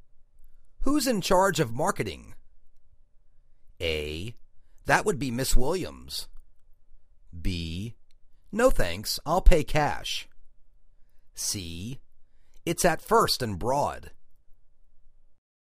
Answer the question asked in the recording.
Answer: That would be Ms. Williams.